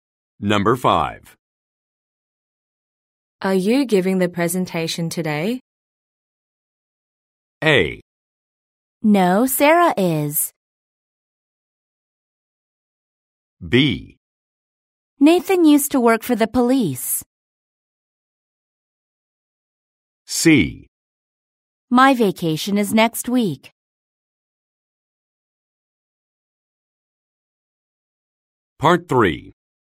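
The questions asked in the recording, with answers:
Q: Are you giving the presentation today?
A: A: No, Sarah is.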